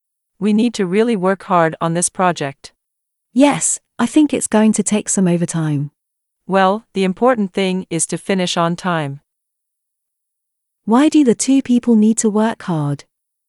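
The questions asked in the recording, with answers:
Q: Why do the two people need to work hard?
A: To finish the project on time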